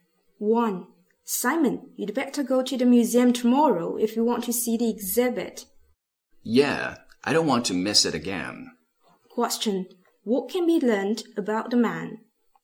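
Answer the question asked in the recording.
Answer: He missed the exhibit before and plans to go tomorrow.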